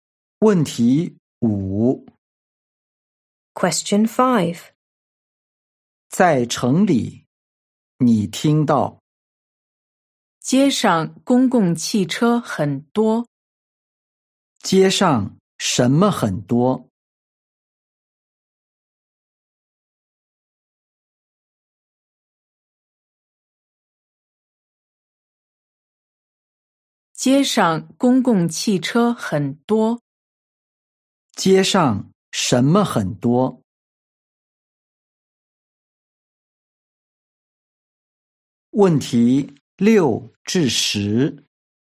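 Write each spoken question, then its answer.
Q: 街上什么很多?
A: 公共汽车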